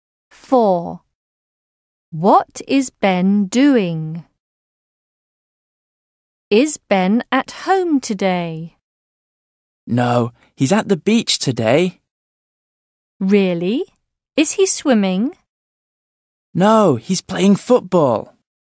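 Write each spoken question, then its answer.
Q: What is Ben doing?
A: Playing football at the beach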